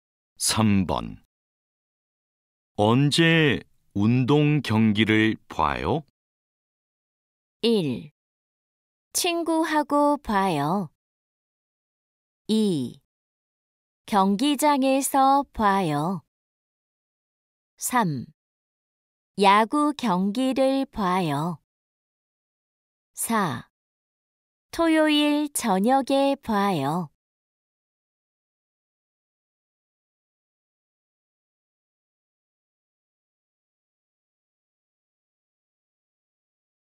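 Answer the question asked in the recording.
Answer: 4: 토요일 저녁에 봐요.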